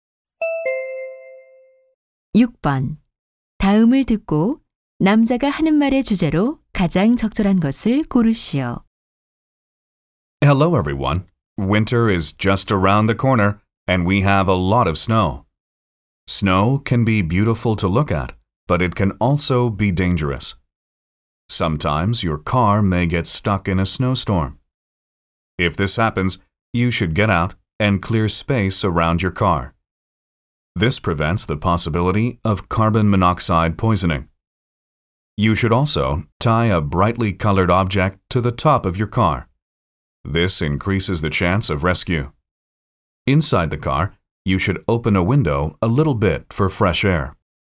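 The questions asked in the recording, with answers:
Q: 다음을 듣고 남자가 하는 말의 주제로 가장 적절한 것을 고르시오.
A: 눈보라 속에 차가 갇혔을 때 대처 요령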